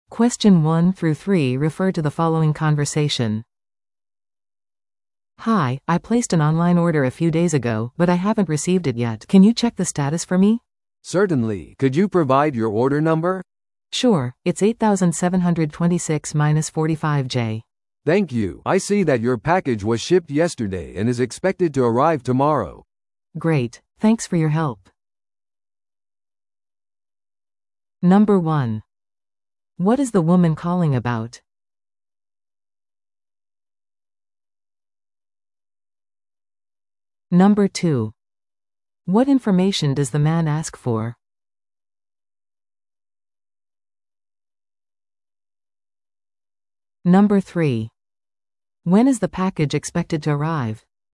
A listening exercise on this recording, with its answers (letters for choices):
Listen to the audio below and answer the questions.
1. What is the woman calling about?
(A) 新しい注文をする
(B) 商品を返品する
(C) 配送状況を確認する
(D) 返金を依頼する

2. What information does the man ask for?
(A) 女性の住所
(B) 追跡番号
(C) 注文番号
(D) 商品の詳細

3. When is the package expected to arrive?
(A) 今日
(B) 明日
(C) 3日後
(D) 来週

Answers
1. C
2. C
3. B

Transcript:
A: "Hi, I placed an online order a few days ago, but I haven't received it yet. Can you check the status for me?"
B: "Certainly. Could you provide your order number?"
A: "Sure, it's 8726-45J."
B: "Thank you. I see that your package was shipped yesterday and is expected to arrive tomorrow."
A: "Great! Thanks for your help."